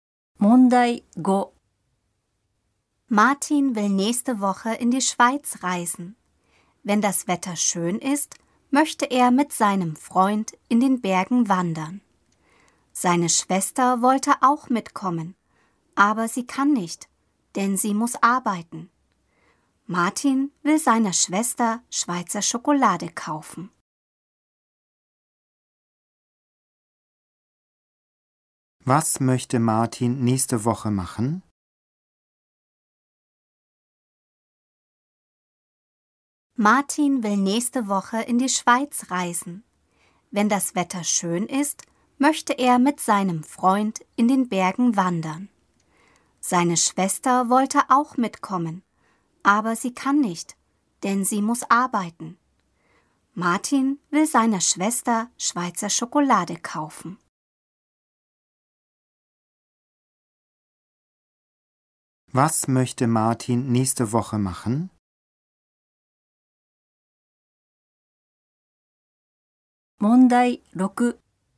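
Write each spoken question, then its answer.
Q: Was möchte Martin nächste Woche machen?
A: In der Schweiz in den Bergen wandern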